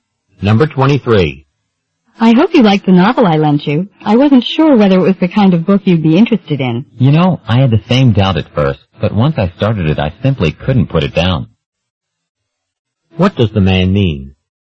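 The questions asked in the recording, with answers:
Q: What does the man mean?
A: He enjoyed the novel very much.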